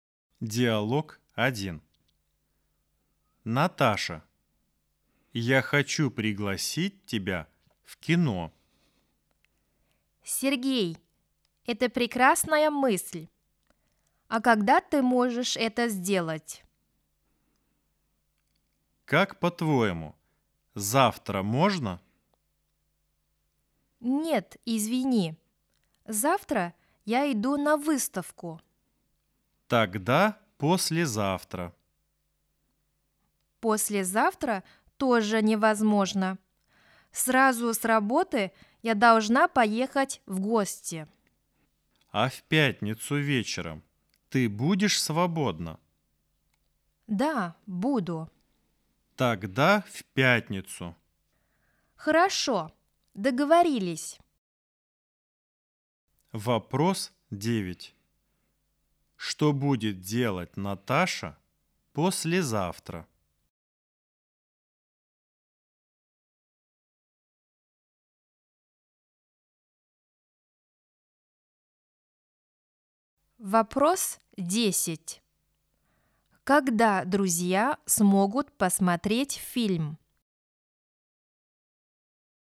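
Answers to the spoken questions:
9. поедет в гости
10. в пятницу вечером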